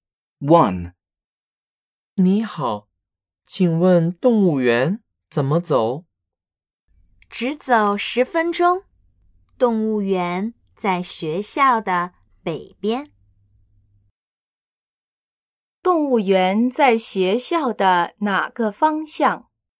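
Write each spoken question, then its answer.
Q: 动物园在学校的哪个方向?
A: 北边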